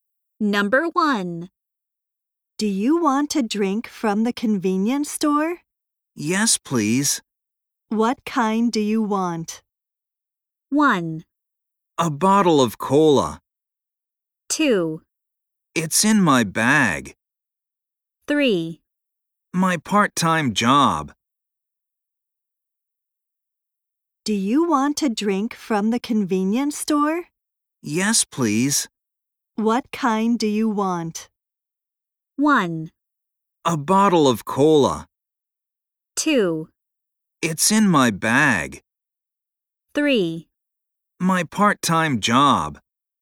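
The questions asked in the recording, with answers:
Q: What kind do you want?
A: 1: A bottle of cola.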